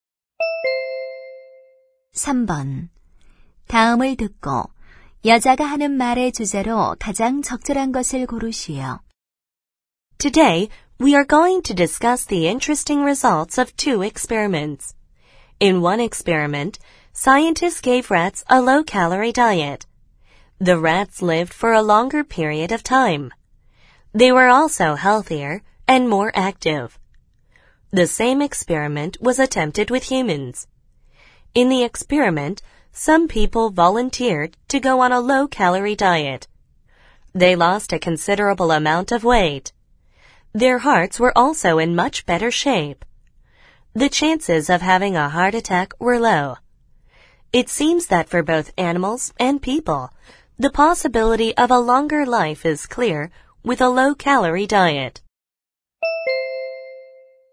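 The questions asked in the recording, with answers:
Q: 다음을 듣고 여자가 하는 말의 주제로 가장 적절한 것을 고르시오.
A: 저칼로리 식단이 수명을 늘리고 건강에 좋다는 실험 결과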